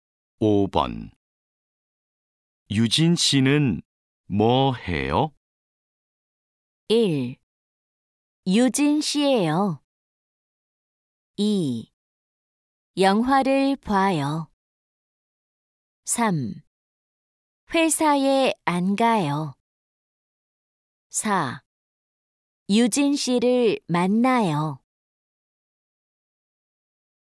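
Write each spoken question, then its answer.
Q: 유진씨는뭐해요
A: 2: 영화를 봐요.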